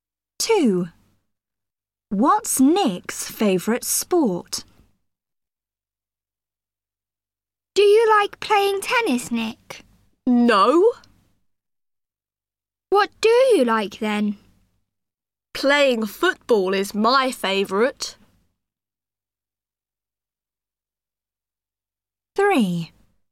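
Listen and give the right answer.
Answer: Playing football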